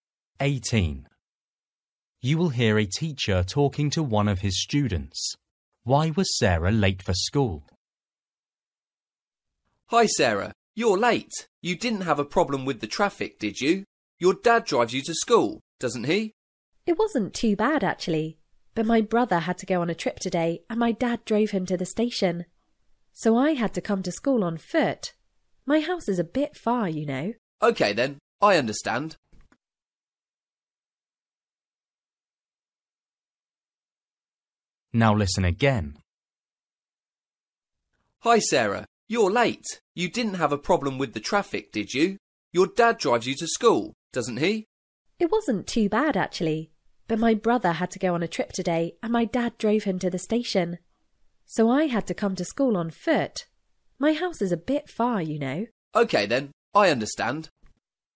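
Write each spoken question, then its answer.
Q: Why was Sarah late for school?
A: Her dad drove her brother to the station, so she had to walk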